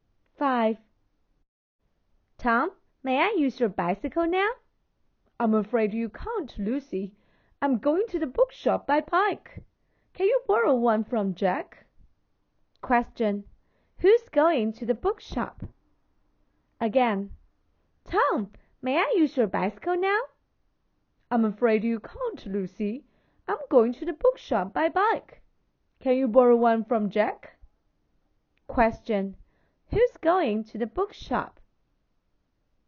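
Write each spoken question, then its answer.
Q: who's going to the bookshop?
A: Tom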